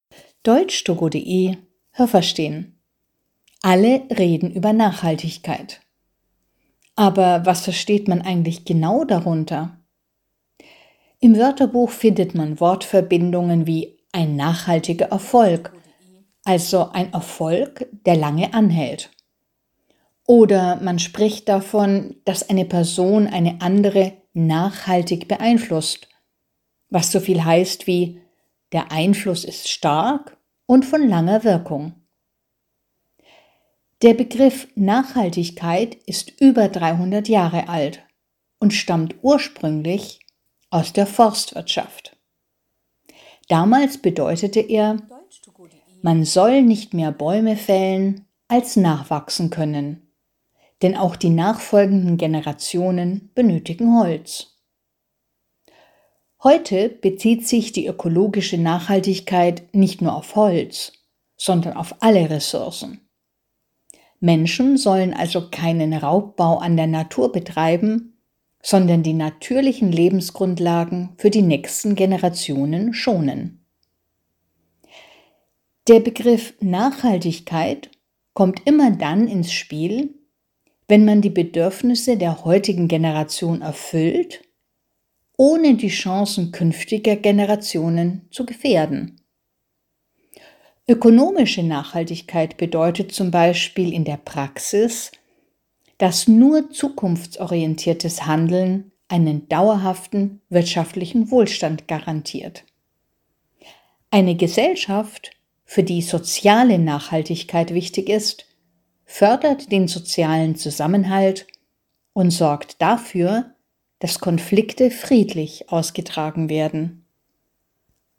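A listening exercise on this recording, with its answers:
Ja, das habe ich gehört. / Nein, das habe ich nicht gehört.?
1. Ein nachhaltiger Erfolg bedeutet so viel wie ein vorübergehender Erfolg.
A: Nein, das habe ich nicht gehört.

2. Der Begriff Nachhaltigkeit ist über 300 Jahre alt und kommt aus der Volkswirtschaft.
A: Nein, das habe ich nicht gehört.

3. Ursprünglich bedeutete Nachhaltigkeit : Man darf nur so viele Bäume fällen, wie neue Bäume nachwachsen können.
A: Ja, das habe ich gehört.

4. Auch heute bezieht sich der Begriff ökologische Nachhaltigkeit nur auf die Forstwirtschaft.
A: Nein, das habe ich nicht gehört.

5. Der Begriff Nachhaltigkeit bedeutet allgemein: Man erfüllt die Bedürfnisse der heutigen Generation, ohne die Möglichkeiten künftiger Generationen einzuschränken.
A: Ja, das habe ich gehört.

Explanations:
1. Ein nachhaltiger Erfolg ist nicht vorübergehend, sondern hält lange an.
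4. Heute bezieht sich der Begriff nicht nur auf Holz, sondern auf alle Rohstoffe, die der Mensch schonen soll.

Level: B2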